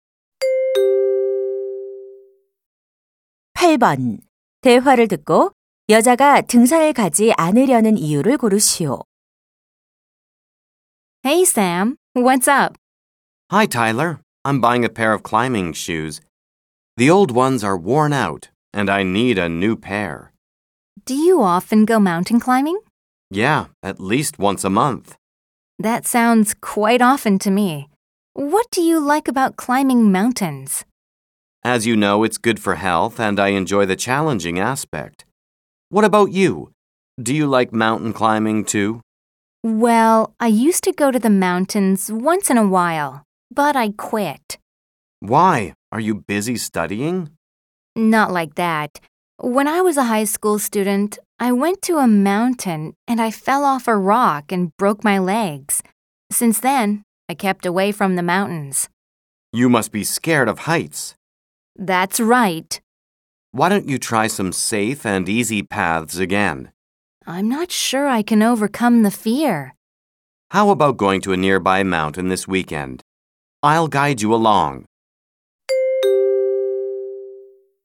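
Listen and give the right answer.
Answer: 높은 곳이 무서워서 (과거 추락 사고)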